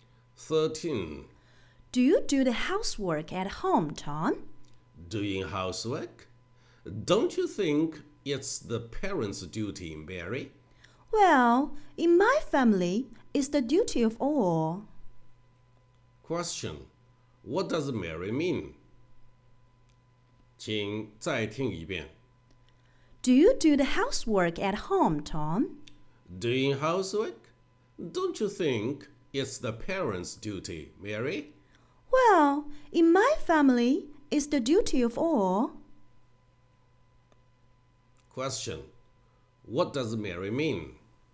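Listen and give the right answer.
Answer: Everyone in the family should do housework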